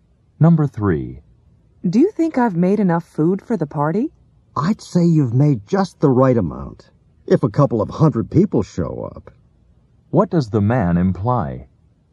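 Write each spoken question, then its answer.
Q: What does the man imply?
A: The woman made too much food.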